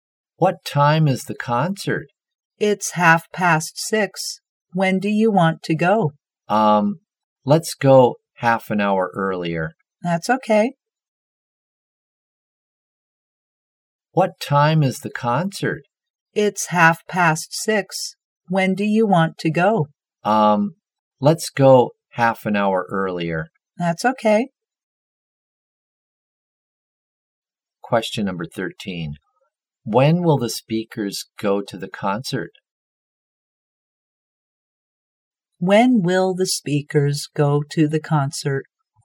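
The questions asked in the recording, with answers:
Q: When will the speakers go to the concert?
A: At 6:00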